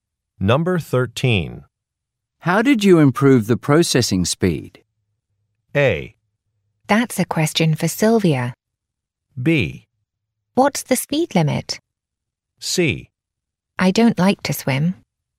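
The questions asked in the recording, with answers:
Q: How did you improve the processing speed?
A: A: That's a question for Sylvia.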